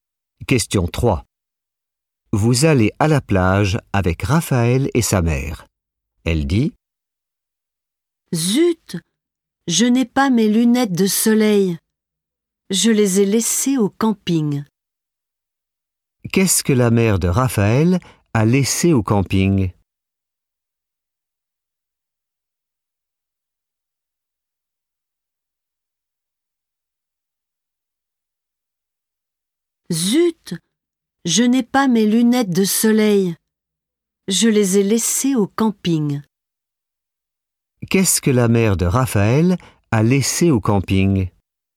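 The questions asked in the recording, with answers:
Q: Qu'est-ce que la mère de Raphaël a laissé au camping?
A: ses lunettes de soleil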